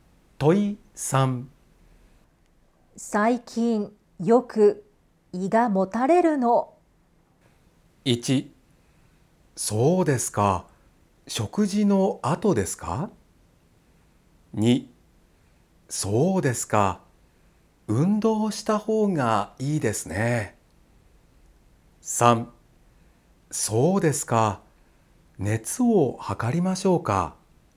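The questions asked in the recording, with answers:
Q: 最近よく胃がもたれるの。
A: 1: そうですか。食事の後ですか。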